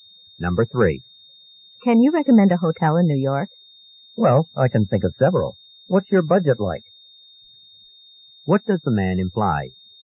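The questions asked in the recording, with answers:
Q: What does the man imply?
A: His recommendation depends on how much the woman wants to spend.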